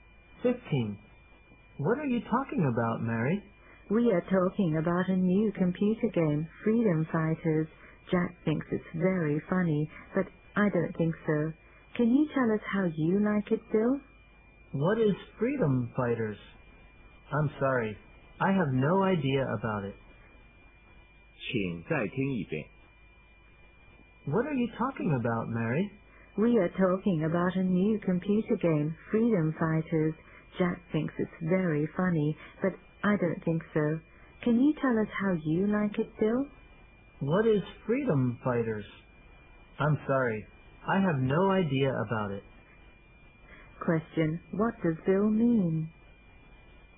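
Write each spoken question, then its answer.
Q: Question. What does Bill mean?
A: He doesn't know anything about the game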